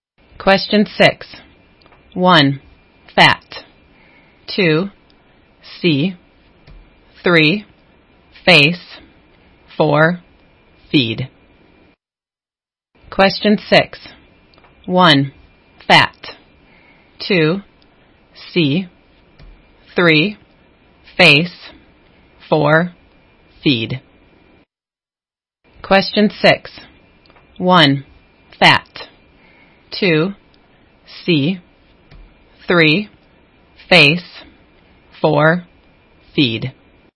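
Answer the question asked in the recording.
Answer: 2: see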